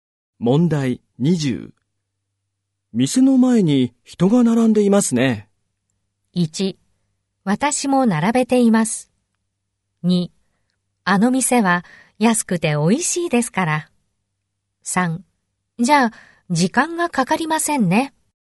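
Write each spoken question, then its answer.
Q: 店の前に人が並んでいますね。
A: 2: あの店は安くて美味しいですから。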